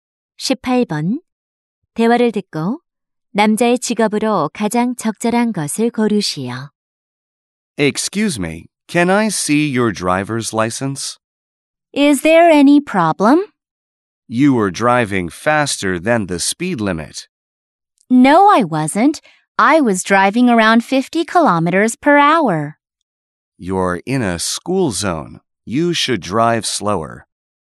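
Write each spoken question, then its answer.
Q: 대화를 듣고 남자의 직업으로 가장 적절한 것을 고르시오.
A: 경찰관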